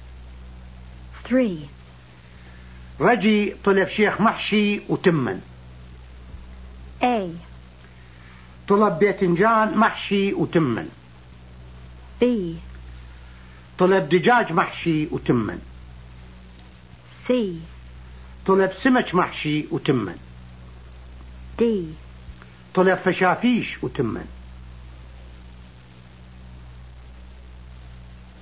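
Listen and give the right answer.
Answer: A: طلب باذنجان محشي وتمن.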